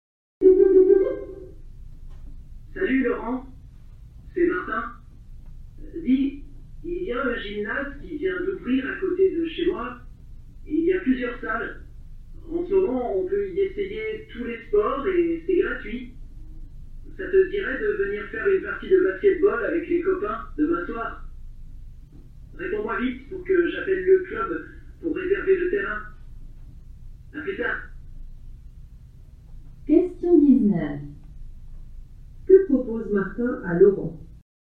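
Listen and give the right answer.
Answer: De venir jouer au basketball avec les copains demain soir dans un nouveau gymnase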